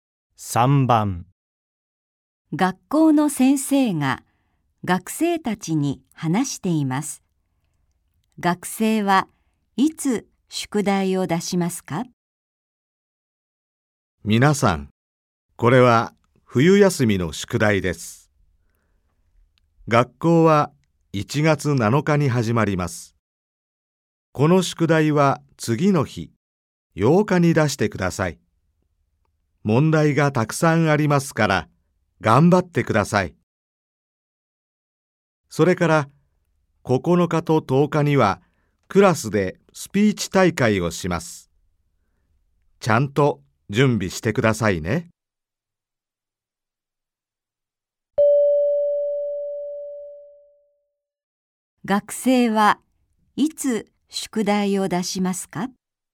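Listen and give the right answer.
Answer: 1月8日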